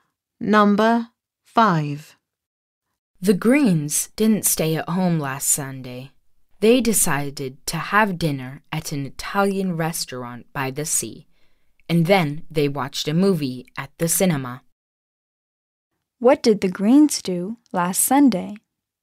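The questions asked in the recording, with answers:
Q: What did the Greens do last Sunday?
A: They had dinner at an Italian restaurant and watched a movie at the cinema.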